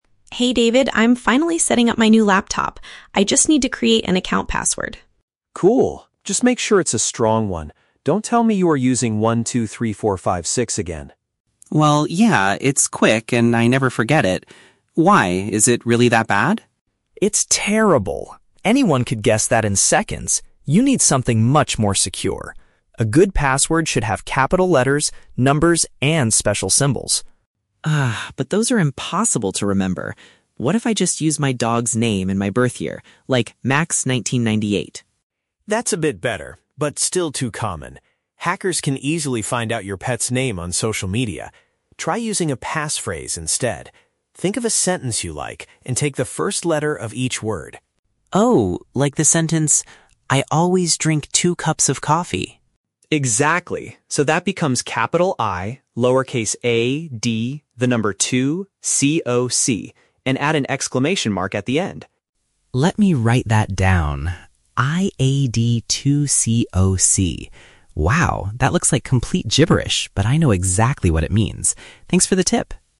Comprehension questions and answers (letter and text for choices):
Listen to the conversation between two roommates and choose the correct answer (A, B, or C) for each question.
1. Why does David object to Sam's very first password idea?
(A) It is too long to type quickly on a new keyboard.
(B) It can be figured out by other people almost instantly.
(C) It does not include the year he was born.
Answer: (B) It can be figured out by other people almost instantly.

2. What is the main issue with using "Max1998" as a password?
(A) It does not contain any numbers to make it secure.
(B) It is a popular password that comes with the laptop.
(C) Cybercriminals can easily uncover that kind of personal detail.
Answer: (C) Cybercriminals can easily uncover that kind of personal detail.

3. How does Sam generate his final, secure password?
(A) He uses the starting letters of words from a memorable sentence.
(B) He types a completely random mixture of letters and numbers.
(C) He combines the name of his favorite coffee shop with a symbol.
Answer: (A) He uses the starting letters of words from a memorable sentence.

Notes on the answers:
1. David says that "123456" is terrible because "Anyone could guess that in seconds." Option B uses the synonym phrase "figured out by other people almost instantly." Why the traps are wrong: Option A is a plausible complaint, but not mentioned. Option C is a trap because the "birth year" is mentioned later in the conversation, but it is not the reason David rejects the first password.
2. David warns that "Hackers can easily find out your pet's name." Option C paraphrases this as "Cybercriminals can easily uncover that kind of personal detail." Why the traps are wrong: Option A is a trap because David does say passwords need numbers, but "Max1998" actually has numbers in it, so that is not the reason it is rejected. Option B is plausible but never mentioned.
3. David tells Sam to "Think of a sentence you like, and take the first letter of each word." Sam follows this advice to make his password. Why the traps are wrong: Option B is a trap because Sam says his password "looks like complete gibberish" (random nonsense), but it is actually NOT random; it has a specific meaning. Option C is a trap because the word "coffee" is in the audio, but he uses a sentence about coffee, not the name of a

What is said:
Sam: Hey David, I'm finally setting up my new laptop. I just need to create an account password.
David: Cool! Just make sure it's a strong one. Don't tell me you are using "123456" again.
Sam: Well, yeah. It's quick and I never forget it. Why? Is it really that bad?
David: It's terrible! Anyone could guess that in seconds. You need something much more secure. A good password should have capital letters, numbers, and special symbols.
Sam: Ugh, but those are impossible to remember. What if I just use my dog's name and my birth year?
David: That's a bit better, but still too common. Hackers can easily find out your pet's name on social media. Try using a passphrase instead. Think of a sentence you like, and take the first letter of each word.
Sam: Oh, like the sentence, "I always drink two cups of coffee!"
David: Exactly! So that becomes capital 'I', lowercase 'a', 'd', the number '2', 'c', 'o', 'c', and add an exclamation mark at the end.
Sam: Let me write that down... "Iad2coc!". Wow, that looks like complete gibberish, but I know exactly what it means. Thanks for the tip!